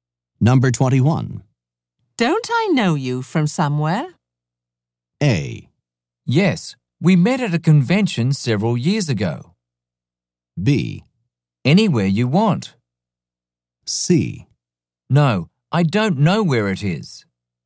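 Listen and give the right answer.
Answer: A: Yes. We met at a convention several years ago.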